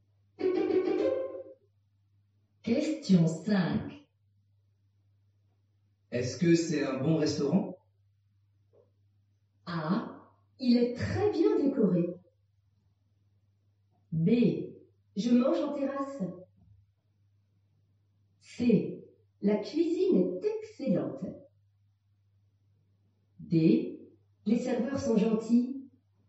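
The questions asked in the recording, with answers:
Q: Est-ce que c'est un bon restaurant?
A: C: La cuisine est excellente.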